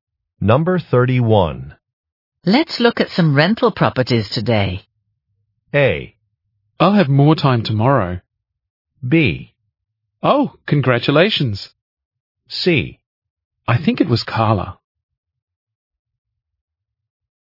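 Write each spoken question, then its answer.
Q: Let's look at some rental properties today.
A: A: I'll have more time tomorrow.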